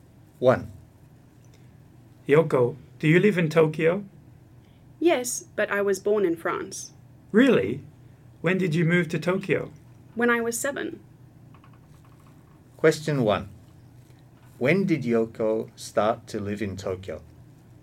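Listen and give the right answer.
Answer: When she was 7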